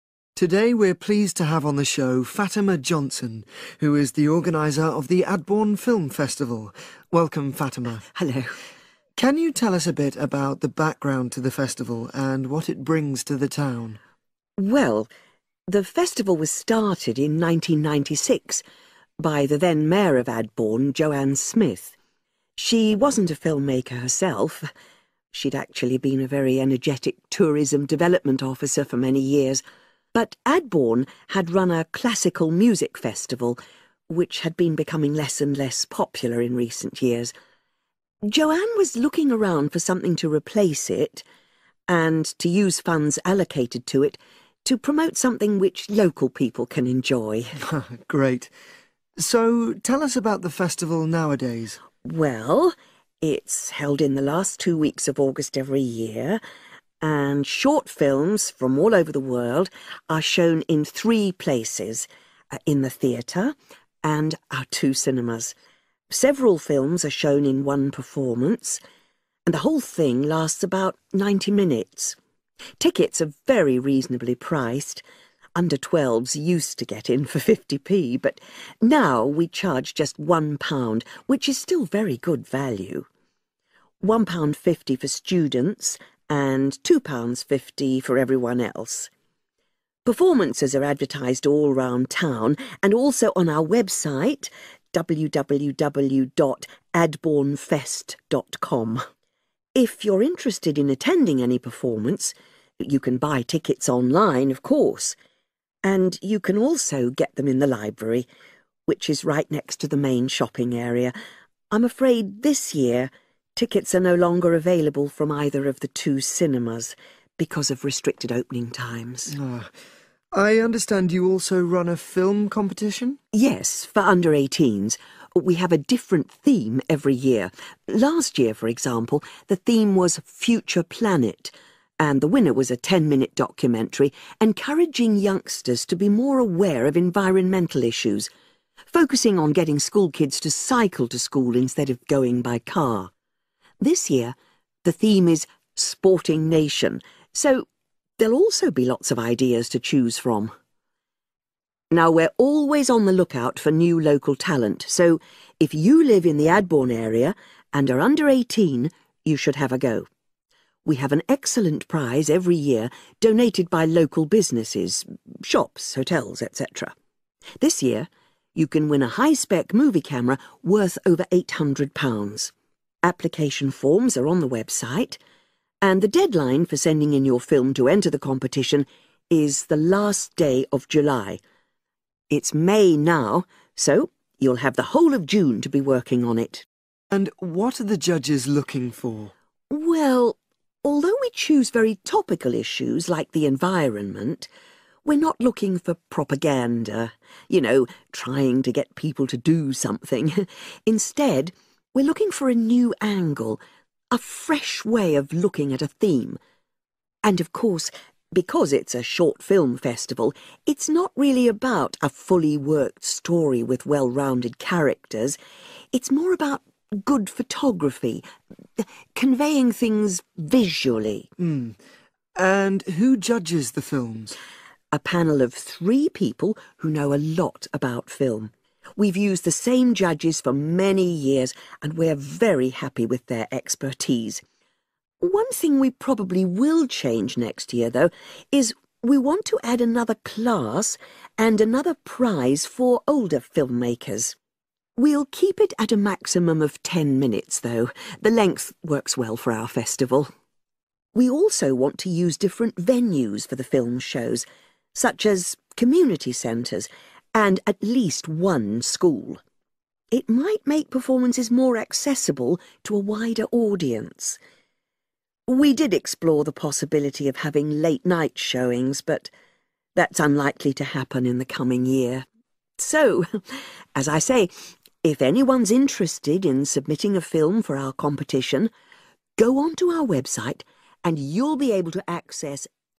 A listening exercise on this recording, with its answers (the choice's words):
Choose the correct answer A, B, or C.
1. Why was the Film Festival started?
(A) To encourage local people to make films.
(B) To bring more tourists to the town.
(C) To use money released from another project.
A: To use money released from another project.

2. What is the price range for tickets?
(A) £1.00-£2.50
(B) 50p - £2.00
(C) £1.50-£2.5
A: £1.00-£2.50

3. As well as online, tickets for the films can be obtained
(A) from the local library.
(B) from several different shops.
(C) from the two festival cinemas.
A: from the local library.

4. Last year's winning film was about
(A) farms of the future.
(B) schools and the environment.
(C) green transport options.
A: green transport options.

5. This year the competition prize is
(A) a stay in a hotel.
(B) film-making equipment.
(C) a sum of money.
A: film-making equipment.

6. The deadline for entering a film in the competition is the end of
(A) May.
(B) June.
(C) July.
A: July.

Choose TWO letters, A-E.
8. What TWO main criteria are used to judge the film competition?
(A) Ability to persuade.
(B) Quality of the story.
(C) Memorable characters.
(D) Quality of photography.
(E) Originality.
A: Quality of photography.

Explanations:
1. Khi được hỏi về lý do lễ hội phim bắt đầu thì Fatima trả lời rằng thị trưởng của Adbourne tìm kiếm thứ gì đó để thay thế lễ hội âm nhạc cổ điển trước đó và có thể dùng quỹ để phát triển nó nhằm giúp người dân thưởng thức.
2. Fatima liệt kê các mức giá vé hiện tại: £1 cho trẻ em, £1.50 cho sinh viên, và £2.50 cho những người khác. Vì vậy, khoảng giá vé sẽ từ mức thấp nhất là £1.00 đến mức cao nhất là £2.50.
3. Người nói đề cập rằng bạn có thể mua vé trực tuyến và cũng có thể lấy chúng ở thư viện.
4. Fatima nói rằng bộ phim thắng giải năm ngoái khuyến khích giới trẻ nhận thức về các vấn đề môi trường, và cụ thể là tập trung vào việc khuyến khích học sinh đạp xe đến trường thay vì đi ô tô
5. camera" (một chiếc máy quay phim cấu hình cao). Máy quay phim chính là một loại "film-making equipment".
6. Người nói đã nêu rất rõ ràng rằng hạn chót để gửi phim của bạn... là ngày cuối cùng của tháng Bảy.
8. Fatima cũng nói rằng cuộc thi thiên về hình ảnh đẹp... truyền tải mọi thứ qua thị giác.

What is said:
MC: Today we're pleased to have on the show Fatima Johnson who is the organiser of the Adbourne Film Festival. Welcome, Fatima.
Fatima: Hello.
MC: Can you tell us a bit about the background to the festival and what it brings to the town?
Fatima: Well the festival was started in nineteen ninety six by the then Mayor of Adbourne, Joanne Smith. She wasn't a film maker herself – she'd actually been a very energetic tourism development officer for many years – but Adbourne had run a classical music festival which had been becoming less and less popular in recent years. Joanne was looking around for something to replace it and to use funds allocated to it to promote something which local people can enjoy.
MC: Great. So tell us about the festival nowadays ...
Fatima: Well, it's held in the last two weeks of August every year and short films from all over the world are shown in three places – in the theatre and our two cinemas. Several films are shown in one performance and the whole thing lasts about 90 minutes. Tickets are very reasonably priced – under 12 used to get in for 50p but now we charge just £1 which is still very good value! £1.50 for students and £2.50 for everyone else. Performances are advertised all round town and also on our website www.adbournefest.com. If you're interested in attending any performances you can buy tickets online of course and you can also get them in the library, which is right next to the main shopping area – I'm afraid this year, tickets are no longer available from either of the two cinemas because of restricted opening times.
MC: I understand you also run a film competition?
Fatima: Yes, for under eighteens. We have a different theme every year. Last year for example, the theme was 'Future Planet' and the winner was a 10-minute documentary encouraging youngsters to be more aware of environmental issues, focusing on getting school kids to cycle to school instead of going by car. This year the theme is 'Sporting Nation' – so there'll also be lots of ideas to choose from.
Now we're always on the look-out for new local talent so if you live in the Adbourne area and are under eighteen, you should have a go. We have an excellent prize every year, donated by local businesses – shops, hotels etc. This year you can win a hi-spec movie camera worth over £800. Application forms are on the website and the deadline for sending in your film to enter the competition is the last day of July. It's May now so you'll have the whole of June to be working on it!
MC: And what are the judges looking for?
Fatima: Well, although we choose very topical issues like the environment, we're not looking for propaganda – you know, trying to get people to do something. Instead we're looking for a new angle, a fresh way of looking at a theme. And of course, because it's a short-film festival, it's not really about a fully worked story with well-rounded characters, it's more about good photography, conveying things visually.
MC: And who judges the films?
Fatima: A panel of three people who know a lot about film. We've used the same judges for many years and we're very happy with their expertise. One thing we probably will change next year though is we want to add another class and another prize for older film makers. We'll keep it at a maximum of ten minutes though, the length works well for our festival. We also want to use different venues for the film shows, such as community centres and at least one school. It might make performances more accessible to a wider audience. We did explore the possibility of having late-night showings but that's unlikely to happen in the coming year.
So, as I say, if anyone's interested in submitting a film for our competition, go onto our website and you'll be able to access...